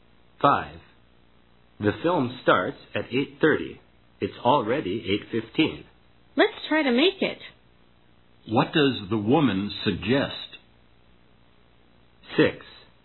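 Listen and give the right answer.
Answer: They try to get to the film in time.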